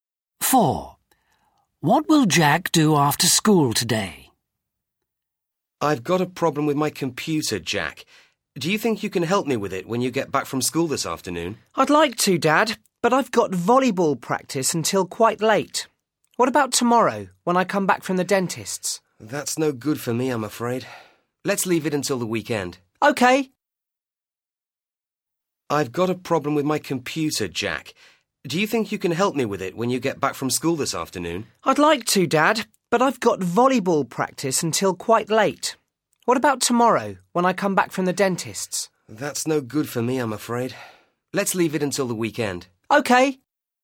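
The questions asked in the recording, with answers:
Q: What will Jack do after school today?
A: Volleyball practice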